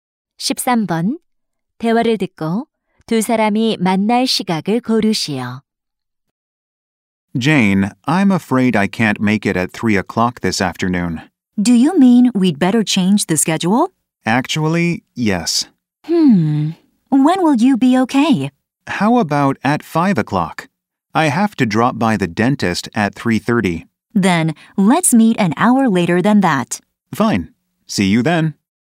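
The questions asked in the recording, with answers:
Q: 대화를 듣고 두 사람이 만날 시각을 고르시오.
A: 6시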